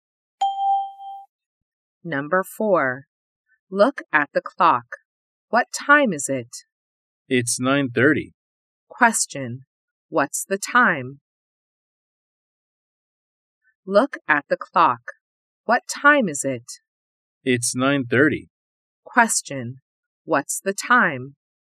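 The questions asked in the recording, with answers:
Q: What's the time?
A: 9:30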